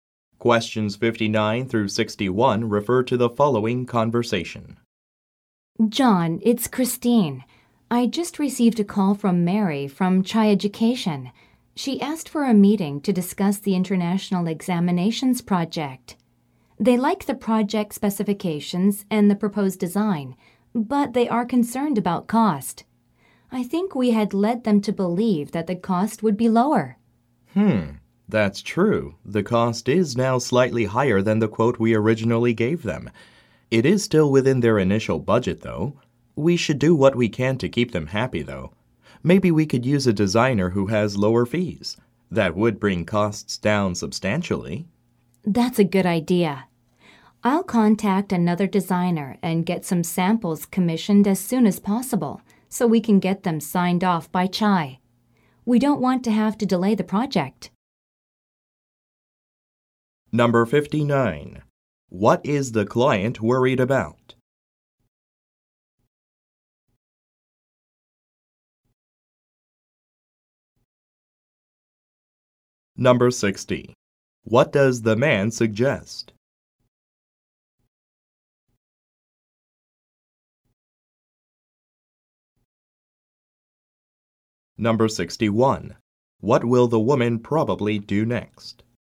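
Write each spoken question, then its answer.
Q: What is the client worried about?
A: The cost of the project

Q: What does the man suggest?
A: Using a designer who has lower fees

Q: What will the woman probably do next?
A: Contact another designer and get samples commissioned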